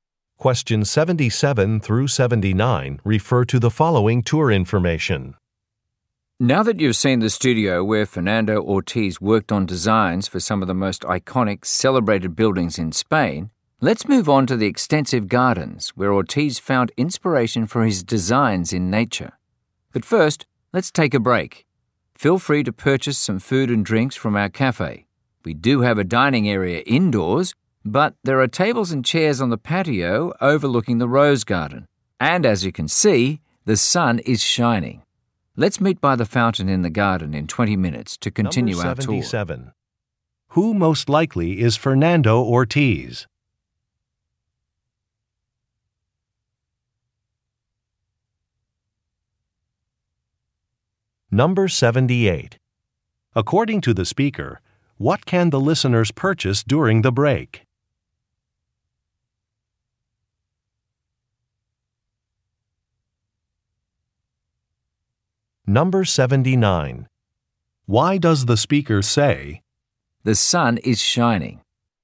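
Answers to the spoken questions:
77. An architect
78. Food and drinks
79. To suggest sitting outside on the patio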